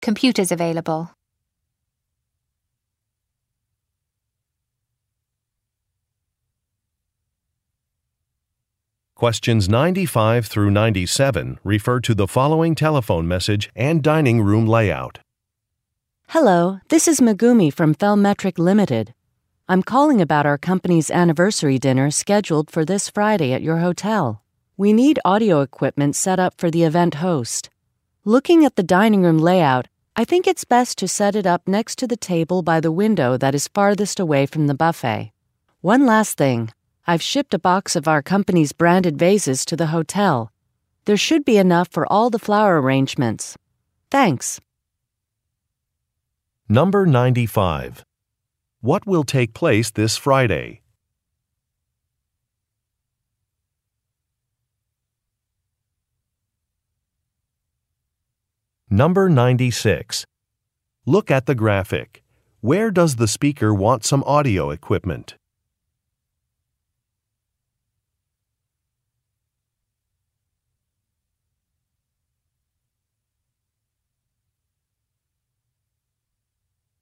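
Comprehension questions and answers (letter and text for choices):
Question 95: What will take place this Friday?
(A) An industry award ceremony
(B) A fund-raising dinner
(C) A company anniversary event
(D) A holiday celebration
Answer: (C) A company anniversary event

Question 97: What has the speaker shipped to the hotel?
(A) Some tablecloths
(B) Some vases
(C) Some aprons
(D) Some glasses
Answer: (B) Some vases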